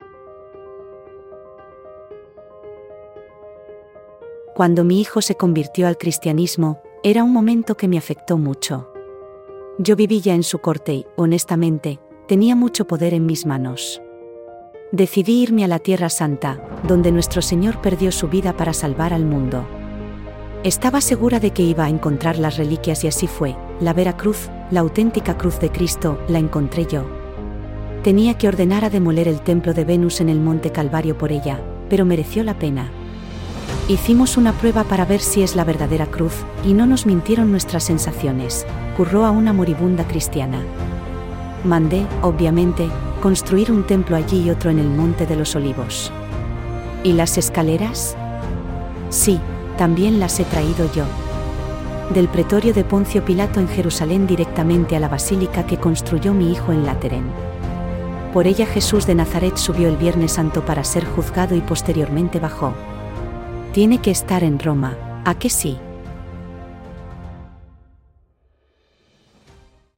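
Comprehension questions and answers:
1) ¿Quién dio las órdenes de trasladar la Escalera desde la Tierra Santa?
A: Santa Helena, madre del emperador Constantino

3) ¿A quién salvó Jesús muriendo en la Cruz, según el dogma del "Cristo Redentor"?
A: Al mundo

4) ¿Dónde estaba la Escalera antes de que se trasladaron aquí a Roma?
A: En el pretorio de Poncio Pilato en Jerusalén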